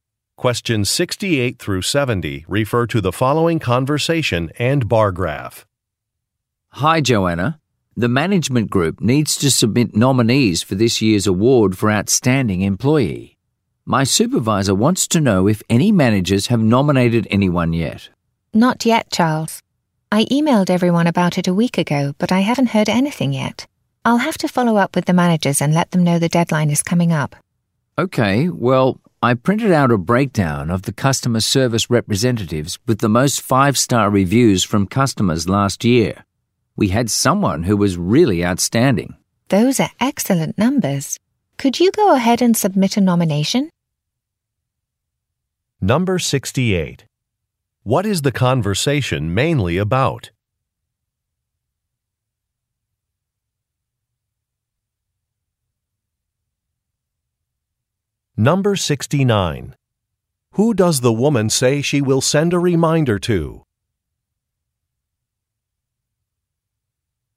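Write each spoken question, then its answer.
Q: What is the conversation mainly about?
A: Nominating someone for the Outstanding Employee award

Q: Who does the woman say she will send a reminder to?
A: The managers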